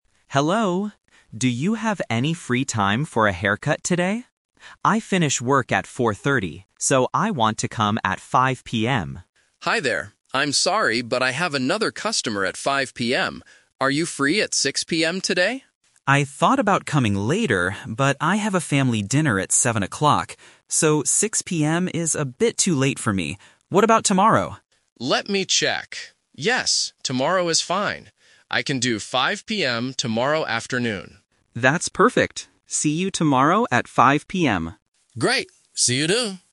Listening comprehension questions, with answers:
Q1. When will the customer get a haircut?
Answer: Tomorrow at 5:00 PM

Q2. Why can't the barber cut the customer's hair at 5:00 PM today?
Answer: The barber has another customer.

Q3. Why does the customer say no to 6:00 PM today?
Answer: He has to go to a family dinner.

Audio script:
Customer: Hello. Do you have any free time for a haircut today? I finish work at 4:30, so I want to come at 5:00 PM.
Barber: Hi there. I'm sorry, but I have another customer at 5:00 PM.
Customer: I thought about coming later, but I have a family dinner at 7:00. So, 6:00 PM is a bit too late for me. What about tomorrow?
Barber: Let me check... Yes, tomorrow is fine.

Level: A2